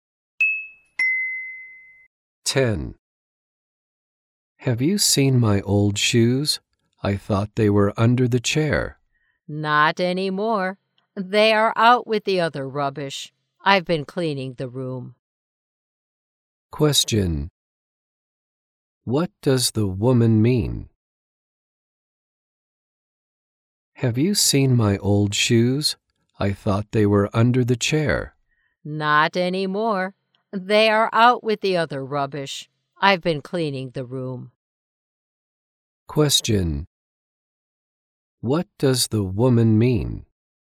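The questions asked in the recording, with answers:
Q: What does the woman mean?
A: The old shoes have been thrown out with the rubbish.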